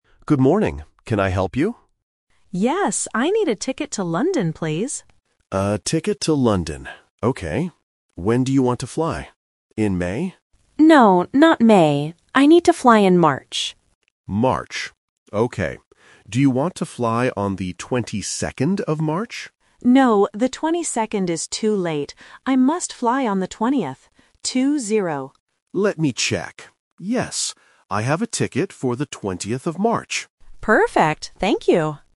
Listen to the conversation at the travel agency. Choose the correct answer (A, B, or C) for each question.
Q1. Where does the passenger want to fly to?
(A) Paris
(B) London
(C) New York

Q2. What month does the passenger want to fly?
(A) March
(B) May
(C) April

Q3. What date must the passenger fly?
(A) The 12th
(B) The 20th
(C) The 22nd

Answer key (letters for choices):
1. B
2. A
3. B

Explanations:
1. The passenger clearly says, "I need a ticket to London". Option A (Paris) and Option C (New York) are other famous cities used as distractors but are not mentioned.
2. The agent asks, "In May?" (Option B is the trap). The passenger corrects him: "No, not May. I need to fly in March". Option C (April) is a plausible month but is never mentioned.
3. The agent suggests "the 22nd" (Option C is the trap). The passenger explicitly says, "No, the 22nd is too late. I must fly on the 20th," and emphasizes "Two-zero." Option A (The 12th) is a phonetic trap.

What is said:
Agent: Good morning. Can I help you?
Passenger: Yes, I need a ticket to London, please.
Agent: A ticket to London. Okay. When do you want to fly? In May?
Passenger: No, not May. I need to fly in March.
Agent: March. Okay. Do you want to fly on the 22nd of March?
Passenger: No, the 22nd is too late. I must fly on the 20th. Two-zero.
Agent: Let me check. Yes, I have a ticket for the 20th of March.